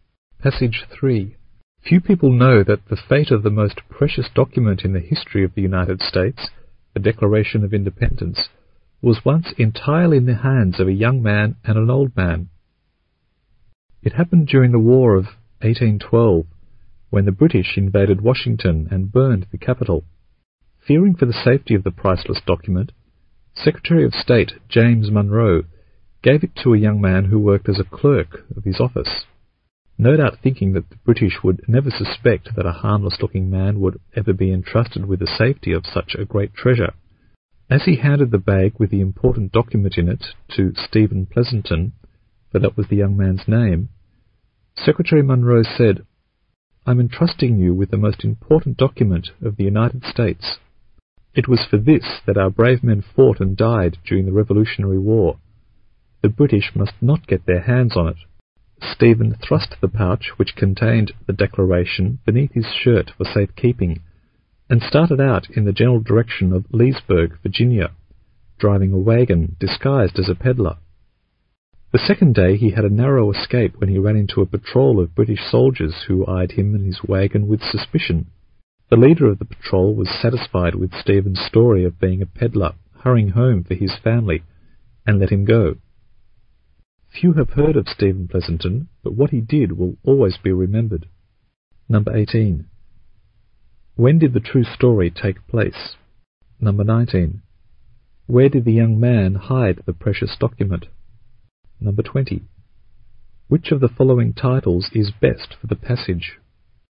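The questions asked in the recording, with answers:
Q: When did the true story take place?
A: During the War of 1812

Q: Where did the young man hide the precious document?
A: Beneath his shirt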